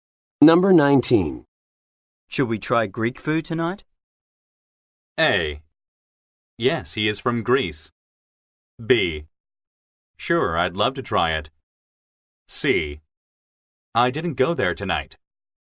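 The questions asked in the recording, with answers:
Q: Should we try Greek food tonight?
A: B: Sure, I'd love to try it.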